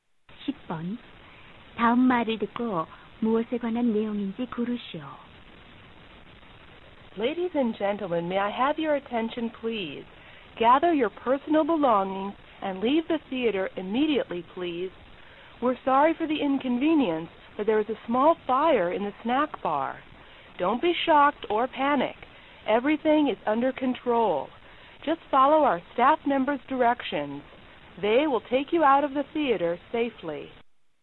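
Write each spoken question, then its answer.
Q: 다음 말을 듣고 무엇에 관한 내용인지 고르시오.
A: 화재로 인한 극장 대피 안내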